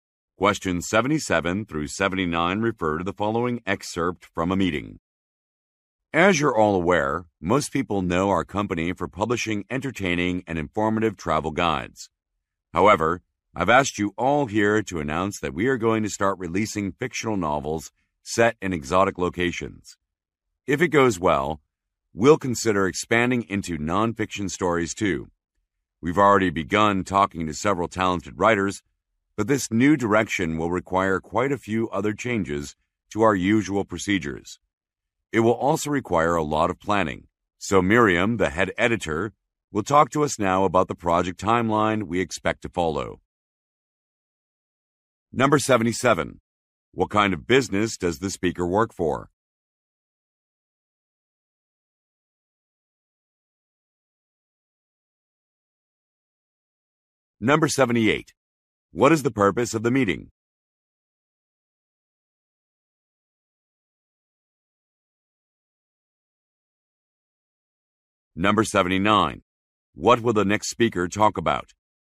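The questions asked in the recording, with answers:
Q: What kind of business does the speaker work for?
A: A publisher of travel guides

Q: What is the purpose of the meeting?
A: To announce the company will start releasing fictional novels

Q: What will the next speaker talk about?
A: The project timeline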